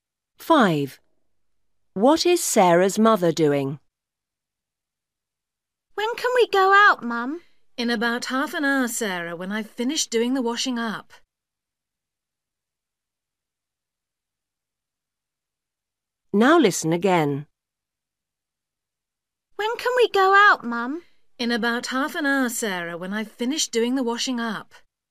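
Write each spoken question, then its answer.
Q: What is Sarah's mother doing?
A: The washing up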